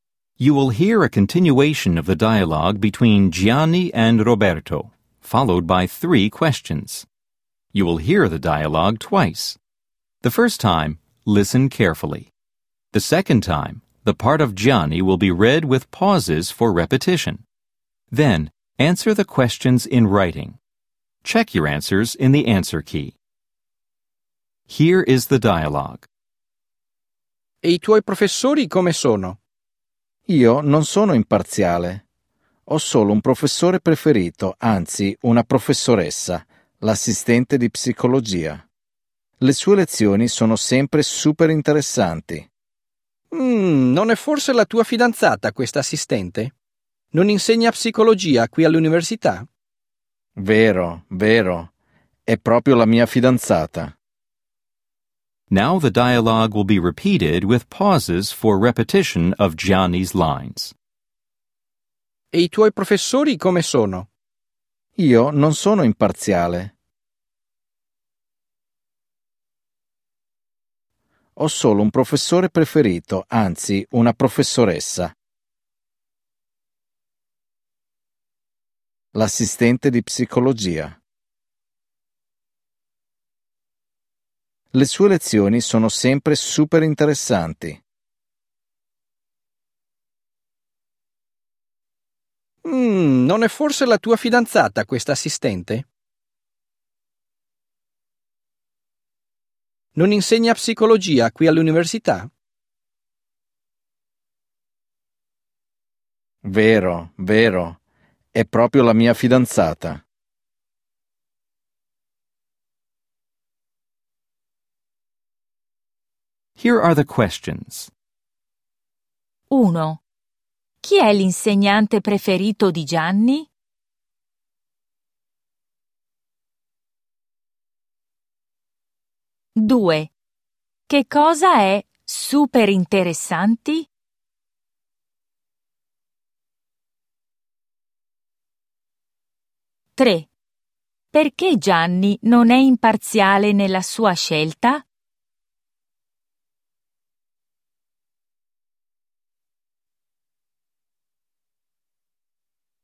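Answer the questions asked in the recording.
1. L'assistente di psicologia, una professoressa
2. Le lezioni dell'assistente di psicologia
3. Perché l'assistente è la sua fidanzata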